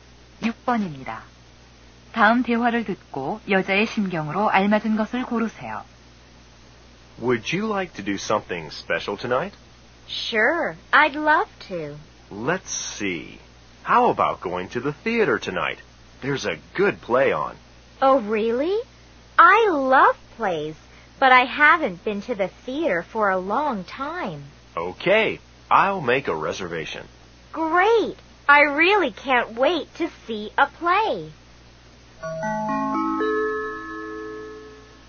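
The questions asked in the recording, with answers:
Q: 다음 대화를 듣고 여자의 심경으로 알맞은 것을 고르세요.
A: 기대감에 들뜸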